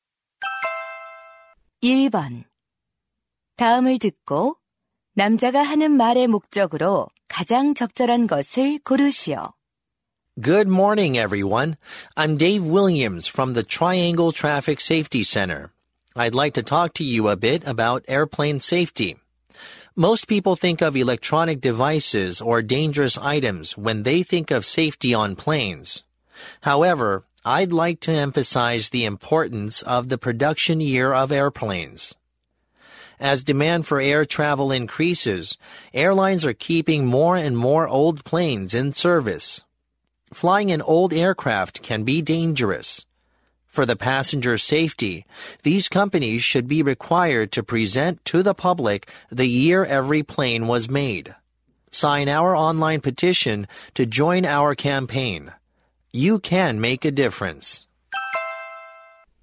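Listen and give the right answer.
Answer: 항공기 제작 연도 공개 요구 청원 참여 독려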